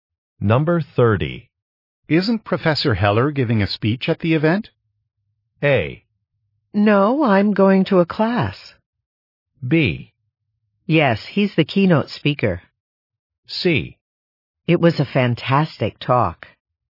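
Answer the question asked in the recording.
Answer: B: Yes, he's the keynote speaker.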